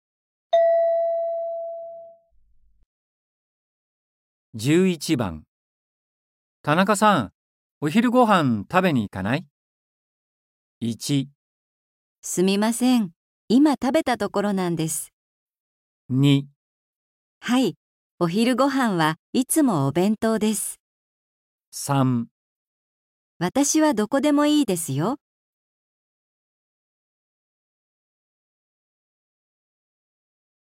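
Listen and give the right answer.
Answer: 1

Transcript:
M: 田中さん、お昼ご飯、食べに行かない?
F: 1. すみません。今食べたところなんです。
2. はい、お昼ご飯はいつもお弁当です。

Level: N4.36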